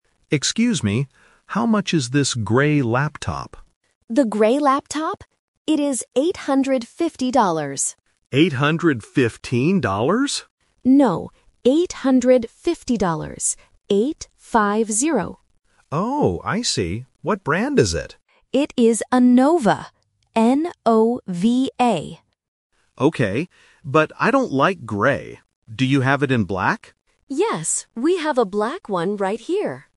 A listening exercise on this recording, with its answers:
Listen to the conversation and choose the correct answer (A, B, or C).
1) What color is the laptop the customer asks about first?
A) Black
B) Grey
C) White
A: B) Grey

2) How much is the laptop?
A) $815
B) $850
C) $800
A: B) $850

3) What is the brand of the laptop?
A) N-O-V-A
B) N-O-B-A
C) M-O-V-A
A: A) N-O-V-A

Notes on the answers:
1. The correct answer is B. The customer explicitly asks, "How much is this grey laptop?". Option A (Black) is the trap because the customer mentions it at the end ("Do you have it in black?"). Option C (White) is not mentioned.
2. The correct answer is B. The staff says it is "850 dollars" and repeats "Eight-five-zero". Option A ($815) is the trap because the customer mishears the price at first ("815 dollars?"), and the numbers "fifteen" and "fifty" sound very similar. Option C ($800) is just a wrong number.
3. The correct answer is A. The staff clearly spells the name of the brand: "N-O-V-A". Option B (N-O-B-A) is a trap because the letters "V" and "B" have similar sounds and are often confused. Option C (M-O-V-A) is a trap because "M" and "N" can sometimes sound alike.

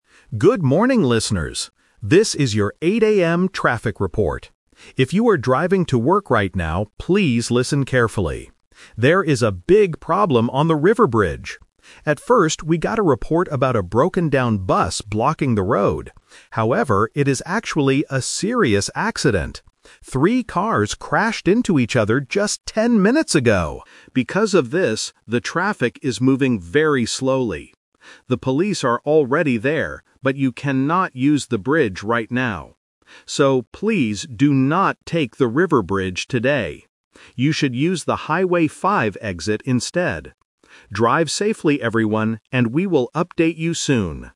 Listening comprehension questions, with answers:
Listen to the radio report and circle the correct answer (A, B, or C).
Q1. What is the actual problem on the River Bridge?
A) A broken-down bus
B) A car accident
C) A road repair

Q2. How many cars were in the crash?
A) Two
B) Three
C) Five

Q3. What does the announcer tell drivers to do?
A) Drive slowly on the River Bridge.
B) Wait for the police to arrive.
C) Use a different road to travel.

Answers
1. B) A car accident
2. B) Three
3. C) Use a different road to travel.

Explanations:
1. This is "The Twist". The announcer says they first got a report about a "broken-down bus" (Option A - Trap), but then clarifies: "However, it is actually a serious accident. Three cars crashed..." Option (C) is a plausible reason for a traffic jam but is not mentioned.
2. The announcer explicitly states, "Three cars crashed into each other". Option (C) is a trap because the number "five" is mentioned later in the audio ("Highway 5 exit"), which can confuse students who only listen for numbers. Option (A) is not mentioned.
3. The announcer says, "please do not take the River Bridge today. You should use the Highway 5 exit instead." This means they must use a different road. Option (A) is a trap; traffic is moving slowly, but drivers are instructed not to take the bridge. Option (B) is a trap because the police are "already there," so drivers don't need to wait for them.

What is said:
If you are driving to work right now, please listen carefully. There is a big problem on the River Bridge. At first, we got a report about a broken-down bus blocking the road. However, it is actually a serious accident. Three cars crashed into each other just ten minutes ago! Because of this, the traffic is moving very slowly. The police are already there, but you cannot use the bridge right now. So, please do not take the River Bridge today. You should use the Highway 5 exit instead. Drive safely, everyone, and we will update you soon.

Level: A2

